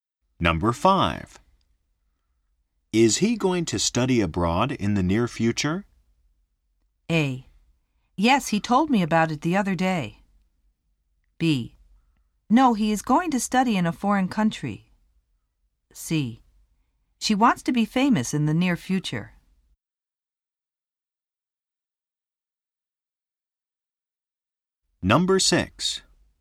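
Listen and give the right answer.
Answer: A: Yes, he told me about it the other day.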